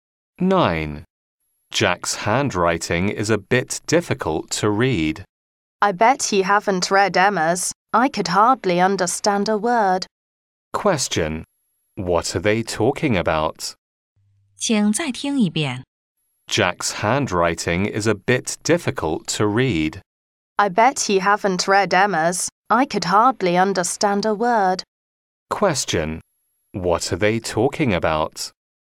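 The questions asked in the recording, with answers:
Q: What are they talking about?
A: Handwriting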